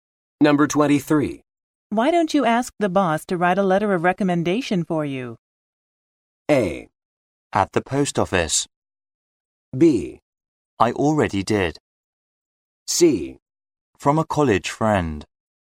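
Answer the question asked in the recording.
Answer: B: I already did.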